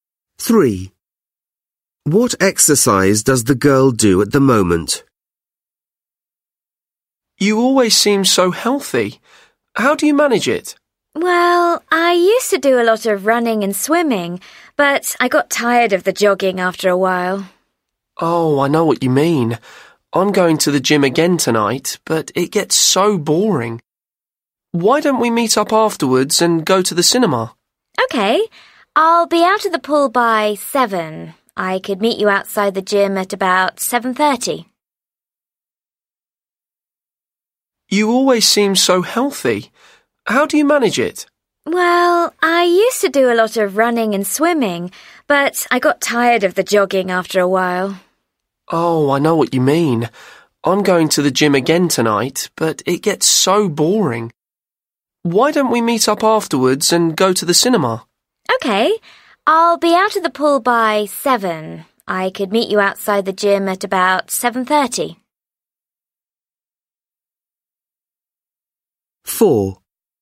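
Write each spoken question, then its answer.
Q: What exercise does the girl do at the moment?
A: Swimming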